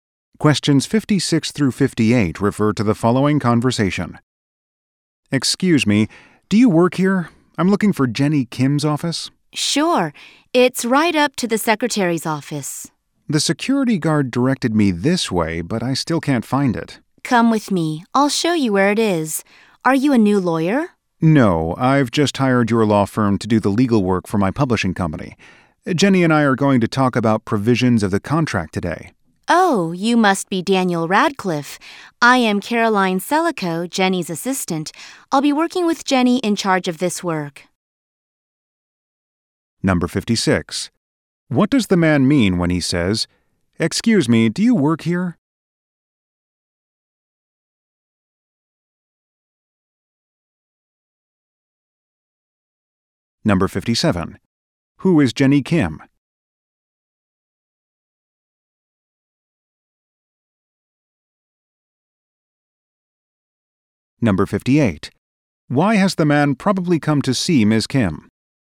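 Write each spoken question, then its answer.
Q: What does the man mean when he says, Excuse me, do you work here?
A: He needs help finding an office

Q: Who is Jenny Kim?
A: A lawyer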